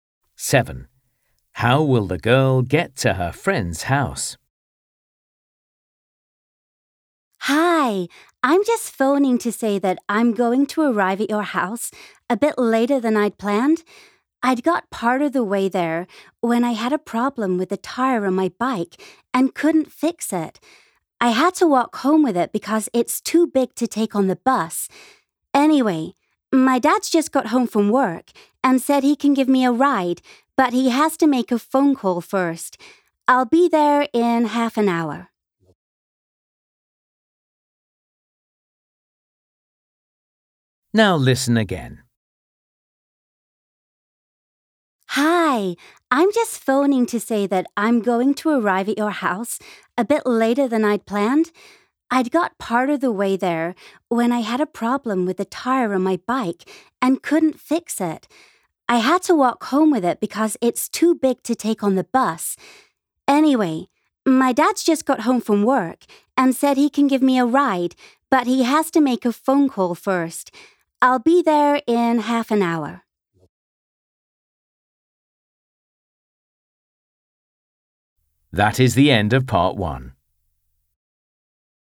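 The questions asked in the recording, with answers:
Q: How will the girl get to her friend's house?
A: by car (her dad will drive her)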